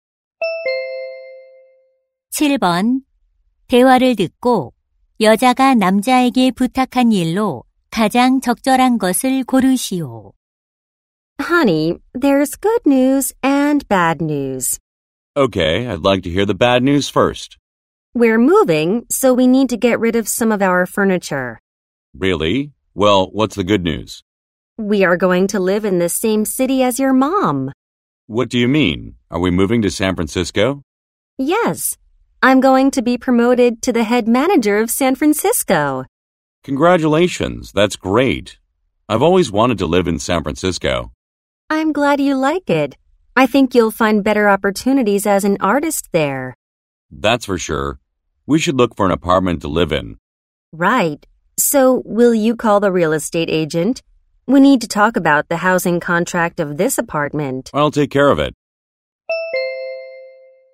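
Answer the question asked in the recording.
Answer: 부동산 중개인에게 전화하기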